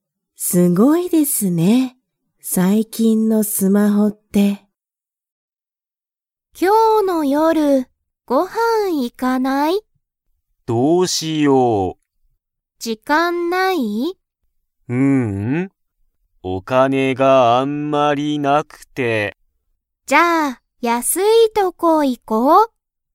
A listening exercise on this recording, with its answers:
Comprehension Quiz (Skip if you don't understand the conversation yet)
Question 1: タカシはお金(かね)がたくさんありますか?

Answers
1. いいえ

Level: Level 1